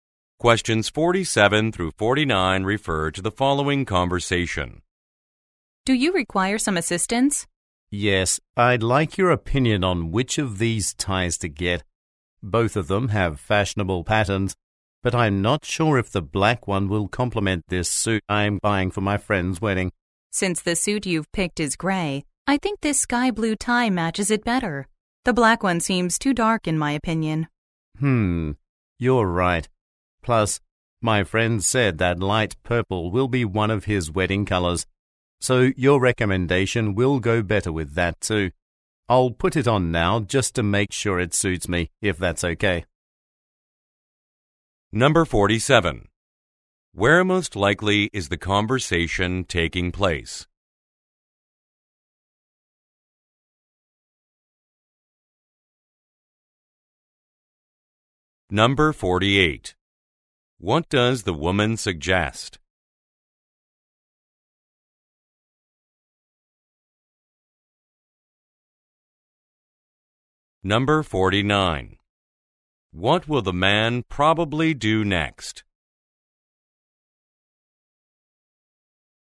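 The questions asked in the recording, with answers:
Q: Where most likely is the conversation taking place?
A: At a clothing store

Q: What does the woman suggest?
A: Buying the sky blue tie

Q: What will the man probably do next?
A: Try on the tie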